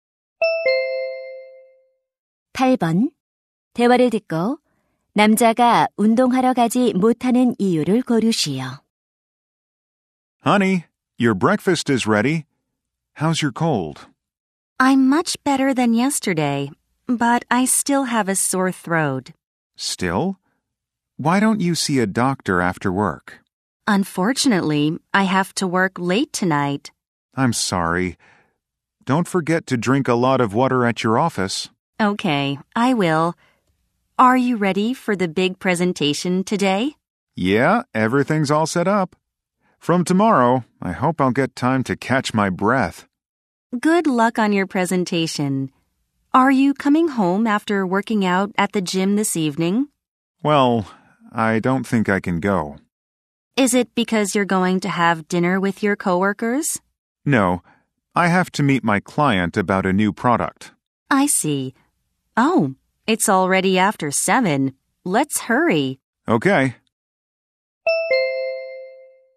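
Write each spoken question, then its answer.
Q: 대화를 듣고 남자가 운동하러 가지 못하는 이유를 고르시오.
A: 신제품 관련해 고객을 만나야 해서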